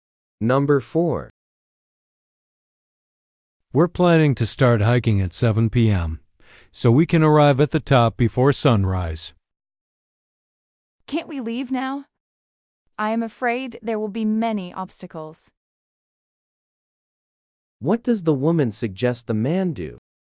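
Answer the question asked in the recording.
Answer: Leave now.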